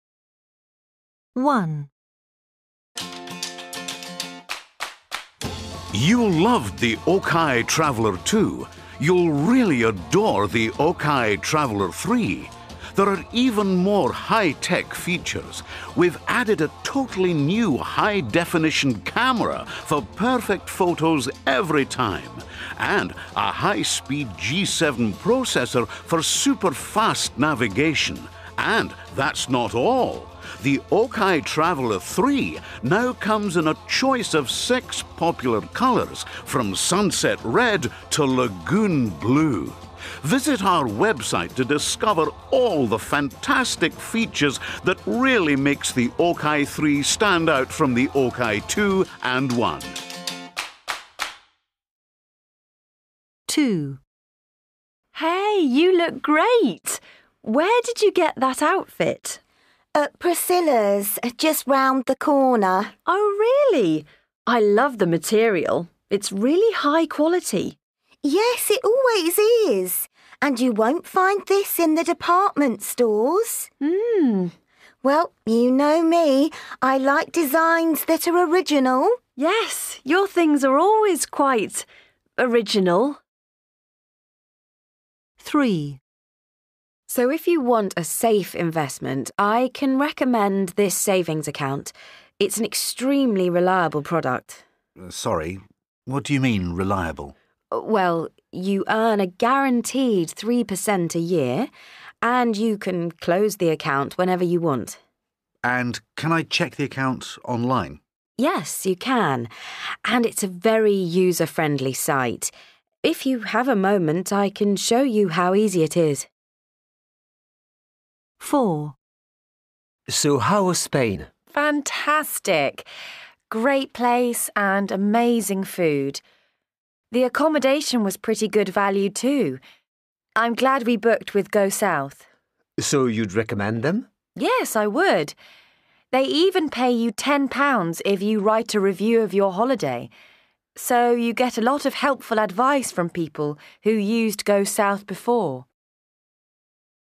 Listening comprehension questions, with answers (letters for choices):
2. Listen again and complete these sentences with a word from the list.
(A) very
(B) totally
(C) pretty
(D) really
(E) extremely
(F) quite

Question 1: We've added a ............... new high-definition camera.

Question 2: I love the material. It's ............... high quality.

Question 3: Your things are always ............... original.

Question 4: It's an ............... reliable product.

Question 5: It's a ............... user-friendly site.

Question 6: The accommodation was ............... good value, too.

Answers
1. B
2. D
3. F
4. E
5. A
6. C

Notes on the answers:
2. I love the material. It's really high quality.
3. Yes, your things are always quite ... original.
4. It's an extremely reliable product.
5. And it's a very user-friendly site.

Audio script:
1
You loved the Okai Traveller 2. You'll really adore the Okai Traveller 3. There are even more high-tech features: we've added a totally new high-definition camera for perfect photos every time, and a high-speak G7 processor for super fast navigation. And that's not all: the Okai Traveller 3 now comes in a choice of six popular colours, from Sunset Red to Lagoon Blue. Visit our website to discover all the fantastic features that really makes the Okai 3 stand out from the Okai 2 and 1.
2
A Hey, you look great. Where did you get that outfit?
B At Priscilla's, just round the corner.
A Oh really? I love the material. It's really high quality.
B Yes, it always is. And you won't find this in the department stores.
B Well, you know me – I like designs that are original.
A Yes, your things are always quite ... original.
3
A So if you want a safe investment, I can recommend this savings account. It's an extremely reliable product.
B Sorry. What do you mean, reliable?
A Well, you earn a guaranteed 3% a year and you can close the account whenever you want.
B And can I check the account online?
A Yes, you can. And it's a very user-friendly site. If you have a moment, I can show you how easy it is.
4
A So how was Spain?
Great place and amazing food. The accommodation was pretty good value, too. I'm glad we booked with Go South.
A So you'd recommend them?
B Yes, I would. They even pay you £10 if you write a review of your holiday. So you get a lot of helpful advice from people who used Go South before.